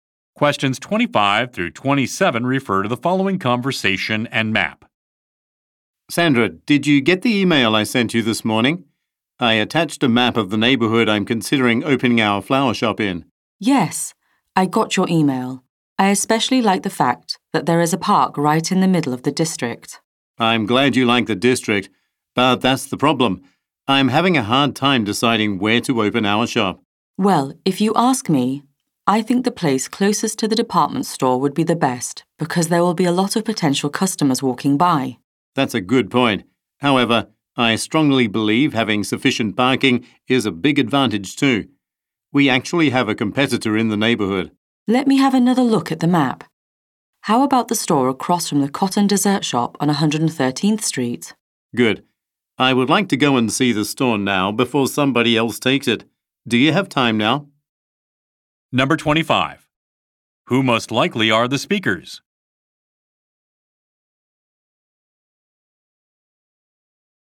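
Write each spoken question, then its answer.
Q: Who most likely are the speakers?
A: Flower shop owners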